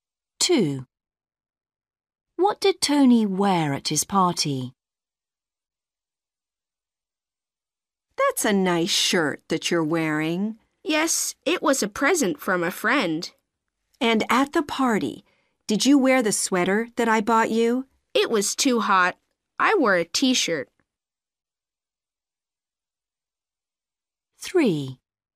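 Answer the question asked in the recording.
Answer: a t-shirt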